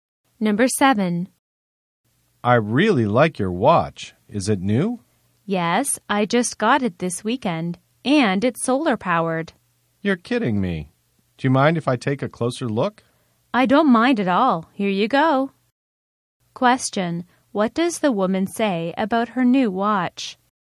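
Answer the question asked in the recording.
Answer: It is new and solar-powered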